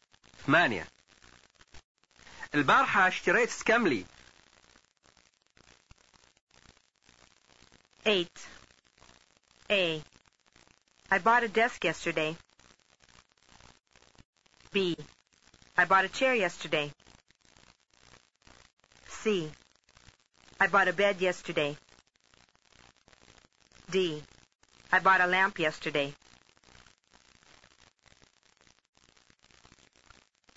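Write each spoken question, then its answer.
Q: البارحة اشتريت سكملي.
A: B: I bought a chair yesterday.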